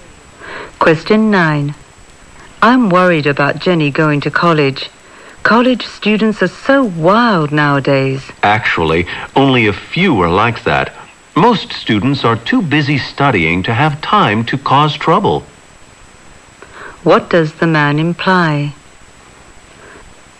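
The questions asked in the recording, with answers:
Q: What does the man imply?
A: Most college students are too busy studying to cause trouble.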